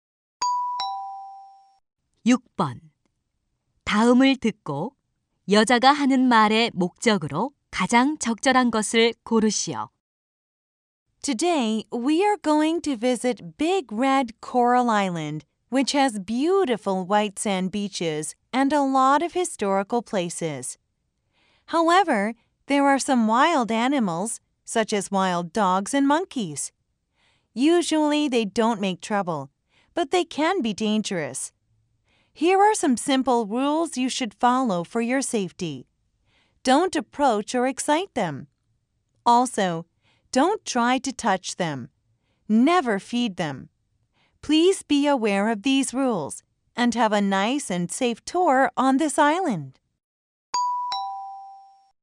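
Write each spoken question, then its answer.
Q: 다음을 듣고 여자가 하는 말의 목적으로 가장 적절한 것을 고르시오.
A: 야생 동물 관련 안전 수칙 안내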